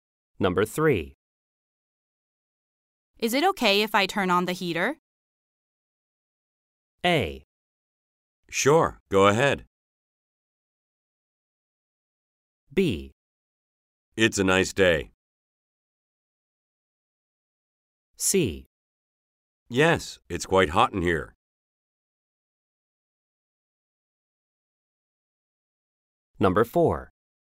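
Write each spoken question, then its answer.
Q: Is it okay if I turn on the heater?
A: A: Sure, go ahead.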